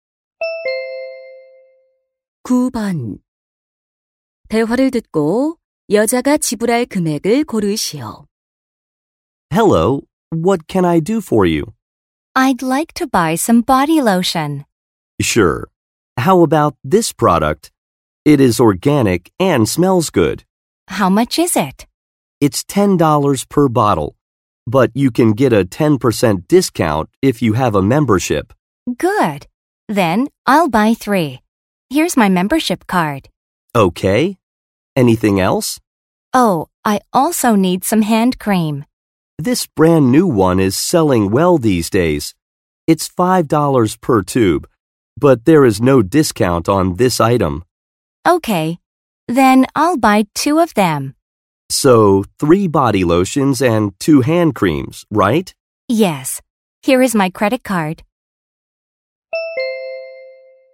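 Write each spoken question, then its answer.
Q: 대화를 듣고 여자가 지불할 금액을 고르시오.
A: $37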